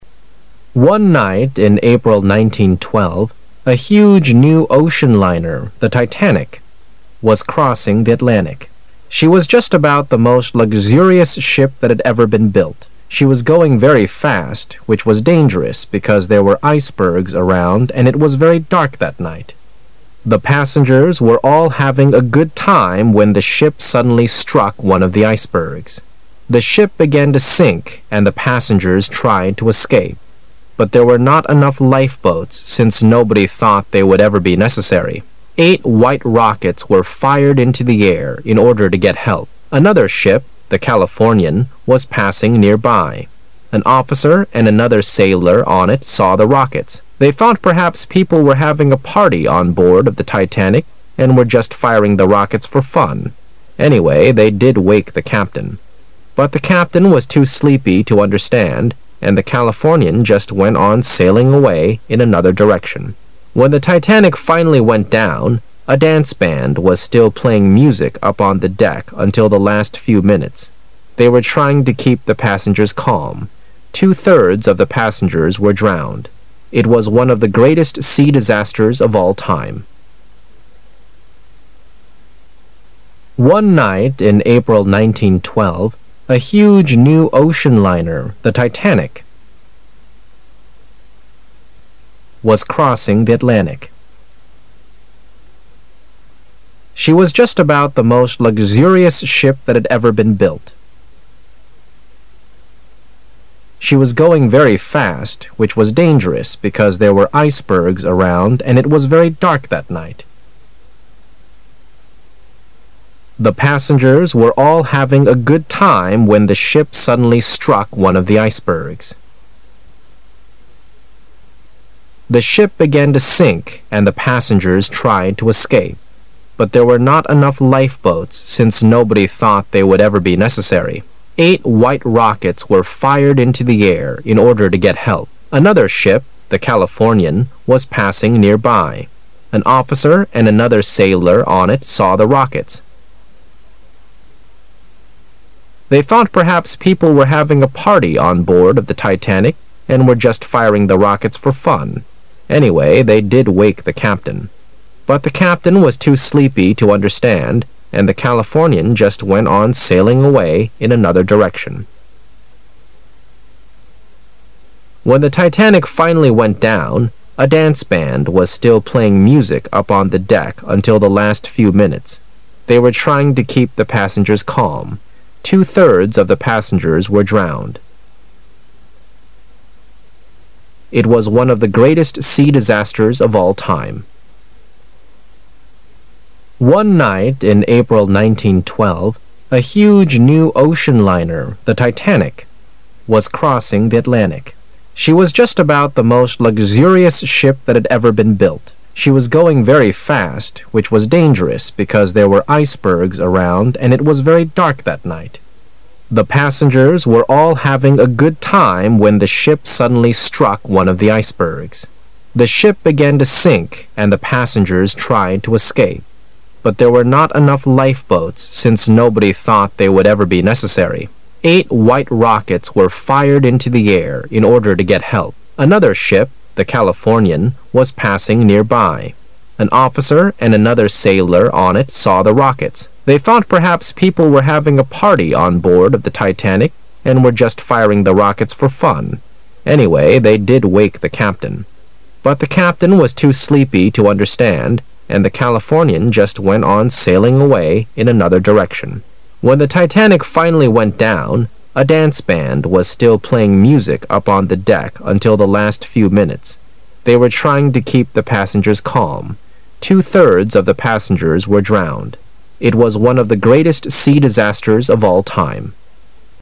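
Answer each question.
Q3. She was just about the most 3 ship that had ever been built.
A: luxurious

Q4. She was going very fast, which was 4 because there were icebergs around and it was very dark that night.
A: dangerous

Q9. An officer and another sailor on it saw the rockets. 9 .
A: They thought perhaps people were having a party on board of the Titanic and were just firing the rockets for fun.

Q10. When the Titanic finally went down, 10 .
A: a dance band was still playing music up on the deck until the last few minutes

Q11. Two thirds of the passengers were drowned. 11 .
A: It was one of the greatest sea disasters of all time.

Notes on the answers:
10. a dance band wasn't stop playing music on the deck till the Titanic went down completely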